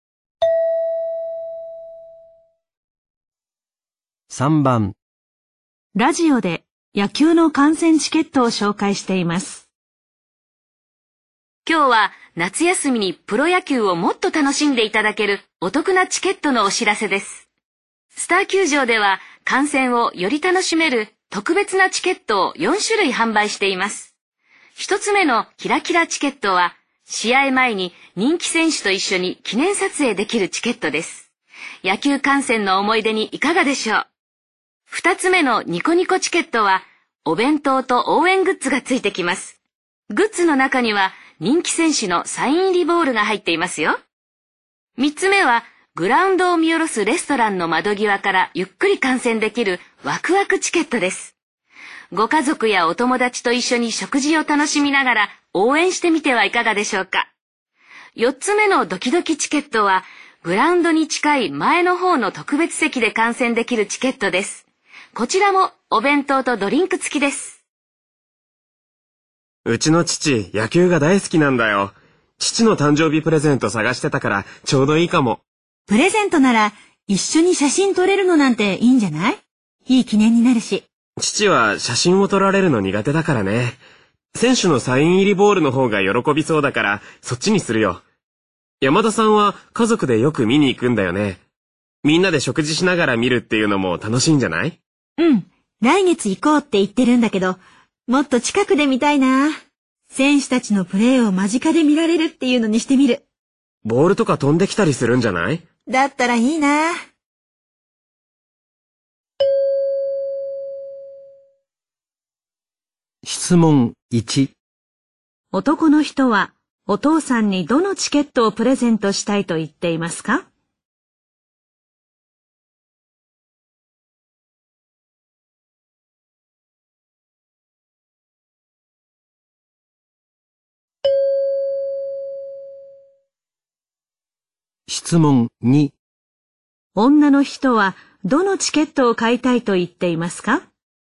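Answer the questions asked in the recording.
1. ニコニコチケット
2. ドキドキチケット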